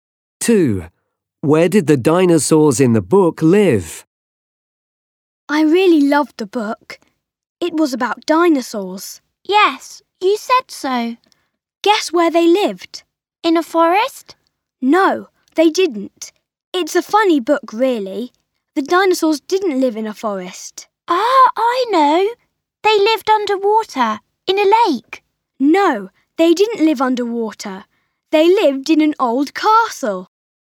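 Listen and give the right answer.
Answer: In an old castle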